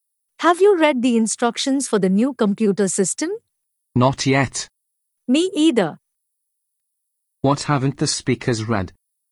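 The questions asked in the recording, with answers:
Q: What haven't the speakers read?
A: The instructions for the new computer system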